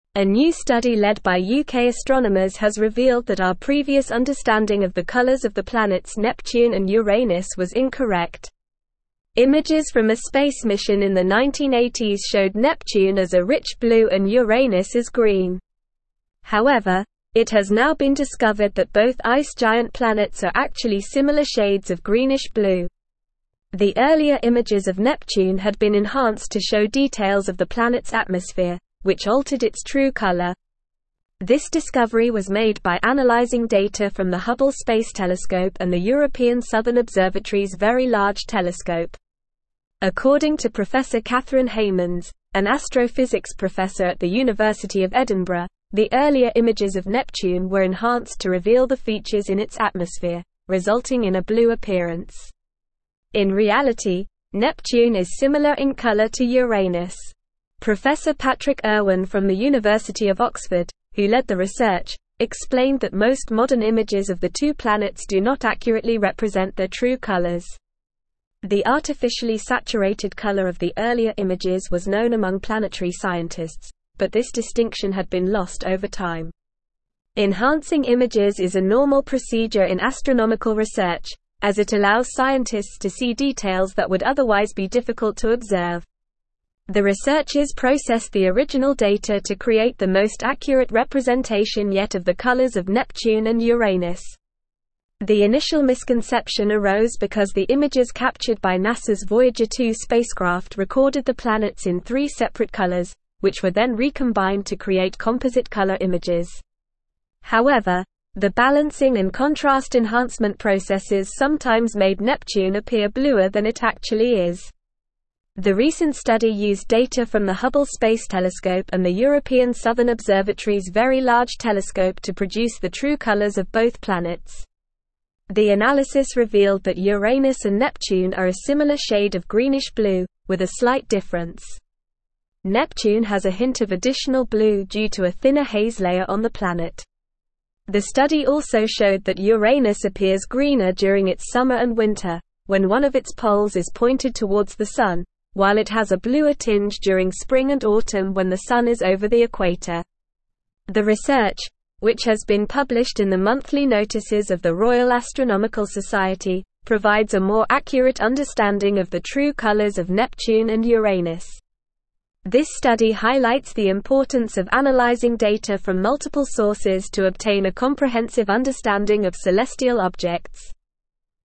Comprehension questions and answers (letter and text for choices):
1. What did the earlier images of Neptune and Uranus show?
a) Neptune as green and Uranus as blue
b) Neptune as blue and Uranus as green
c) Neptune and Uranus as similar shades of greenish blue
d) Neptune and Uranus as completely different colors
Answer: b) Neptune as blue and Uranus as green

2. How were the earlier images of Neptune enhanced?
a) To make it appear bluer than it actually is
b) To show the true colors of the planet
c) To reveal the features in its atmosphere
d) To make it appear greener than it actually is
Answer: c) To reveal the features in its atmosphere

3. Why did the earlier images of Neptune appear blue?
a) Neptune is actually blue in color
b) The images were processed to create composite color images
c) The balancing and contrast enhancement processes made it appear bluer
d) The images were enhanced to show details of its atmosphere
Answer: d) The images were enhanced to show details of its atmosphere

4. What did the recent study use to produce the true colors of Neptune and Uranus?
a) Data from NASA's Voyager 2 spacecraft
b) Data from multiple sources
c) Data from a space mission in the 1980s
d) Data from the Hubble Space Telescope and the European Southern Observatory's Very Large Telescope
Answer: d) Data from the Hubble Space Telescope and the European Southern Observatory's Very Large Telescope

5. What did the analysis reveal about the colors of Neptune and Uranus?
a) They are both greenish blue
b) They are both blue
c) They are both green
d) They are completely different colors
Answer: a) They are both greenish blue

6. What causes Neptune to appear slightly bluer than Uranus?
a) A thinner haze layer on the planet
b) A thicker haze layer on the planet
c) The Sun being over the equator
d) The Sun being pointed towards one of its poles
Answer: a) A thinner haze layer on the planet

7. What does the study highlight the importance of?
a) Enhancing images in astronomical research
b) Analyzing data from multiple sources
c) Using the Hubble Space Telescope and the European Southern Observatory's Very Large Telescope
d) Understanding the true colors of celestial objects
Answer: b) Analyzing data from multiple sources

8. Where was the research published?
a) The University of Edinburgh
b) The University of Oxford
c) Monthly Notices of the Royal Astronomical Society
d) NASA's Voyager 2 spacecraft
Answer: c) Monthly Notices of the Royal Astronomical Society

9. our previous understanding of the colors of the planets (1)______ and Uranus was incorrect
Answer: Neptune

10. Images from a space mission in the 1980s showed Neptune as a rich blue and Uranus as (2)______.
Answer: green

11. The earlier images of Neptune had been enhanced to show (3)______ of the planet's atmosphere, which altered its true color.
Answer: details

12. This discovery was made by analyzing data from the (4)______ Space Telescope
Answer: Hubble

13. explained that most (5)______ images of the two planets do not accurately represent their true (6)______.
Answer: modern

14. explained that most (5)______ images of the two planets do not accurately represent their true (6)______.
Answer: colors

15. The artificially (7)______ color of the earlier images was known among planetary scientists, but this (8)______ had been lost over time.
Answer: saturated

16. The artificially (7)______ color of the earlier images was known among planetary scientists, but this (8)______ had been lost over time.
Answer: distinction

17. The researchers processed the (9)______ data to create the most accurate representation yet of the colors of Neptune and Uranus.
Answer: original

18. the images captured by NASA's Voyager 2 (10)______ recorded the planets in three separate colors, which were then (11)______ to create composite color images.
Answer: spacecraft

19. the images captured by NASA's Voyager 2 (10)______ recorded the planets in three separate colors, which were then (11)______ to create composite color images.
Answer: recombined

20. The recent study used data from the Hubble (12)______ Telescope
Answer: Space

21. The analysis revealed that Uranus and Neptune are a similar shade of greenish blue, with a (13)______ difference.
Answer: slight

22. The study also showed that Uranus appears greener during its (14)______ and winter, when one of its poles is (15)______ towards the Sun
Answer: summer

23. The study also showed that Uranus appears greener during its (14)______ and winter, when one of its poles is (15)______ towards the Sun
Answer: pointed

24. published in the Monthly Notices of the Royal (16)______ Society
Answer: Astronomical

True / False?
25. Most modern images of Neptune and Uranus do not accurately represent their true colors.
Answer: True

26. Uranus appears bluer during its summer and winter, and greener during spring and autumn.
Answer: False

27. The earlier images of Neptune were enhanced to hide details of its atmosphere, which altered its true color.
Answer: False

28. The true colors of Neptune and Uranus are actually different shades of greenish blue.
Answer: False

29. Previous images of Neptune and Uranus showed Neptune as blue and Uranus as green.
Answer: True

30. Enhancing images is a normal procedure in astronomical research to observe details that are difficult to see.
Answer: True

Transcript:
A new study led by UK astronomers has revealed that our previous understanding of the colors of the planets Neptune and Uranus was incorrect. Images from a space mission in the 1980s showed Neptune as a rich blue and Uranus as green. However, it has now been discovered that both ice giant planets are actually similar shades of greenish blue. The earlier images of Neptune had been enhanced to show details of the planet's atmosphere, which altered its true color. This discovery was made by analyzing data from the Hubble Space Telescope and the European Southern Observatory's Very Large Telescope.
According to Professor Catherine Heymans, an astrophysics professor at the University of Edinburgh, the earlier images of Neptune were enhanced to reveal the features in its atmosphere, resulting in a blue appearance. In reality, Neptune is similar in color to Uranus. Professor Patrick Irwin from the University of Oxford, who led the research, explained that most modern images of the two planets do not accurately represent their true colors. The artificially saturated color of the earlier images was known among planetary scientists, but this distinction had been lost over time.
Enhancing images is a normal procedure in astronomical research, as it allows scientists to see details that would otherwise be difficult to observe. The researchers processed the original data to create the most accurate representation yet of the colors of Neptune and Uranus. The initial misconception arose because the images captured by NASA's Voyager 2 spacecraft recorded the planets in three separate colors, which were then recombined to create composite color images. However, the balancing and contrast enhancement processes sometimes made Neptune appear bluer than it actually is.
The analysis revealed that Uranus and Neptune are a similar shade of greenish blue, with a slight difference. Neptune has a hint of additional blue due to a thinner haze layer on the planet. The study also showed that Uranus appears greener during its summer and winter, when one of its poles is pointed towards the Sun, while it has a bluer tinge during spring and autumn when the Sun is over the equator.
The research, which has been published in the Monthly Notices of the Royal Astronomical Society, provides a more accurate understanding of the true colors of Neptune and Uranus. This study highlights the importance of analyzing data from multiple sources to obtain a comprehensive understanding of celestial objects.

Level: Level 4